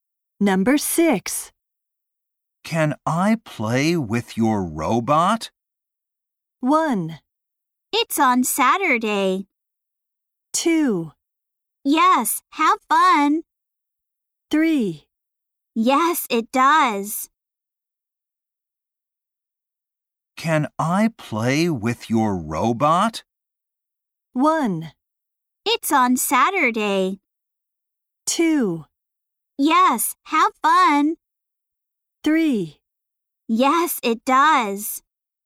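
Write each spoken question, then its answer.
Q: Can I play with your robot?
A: 2: Yes, have fun.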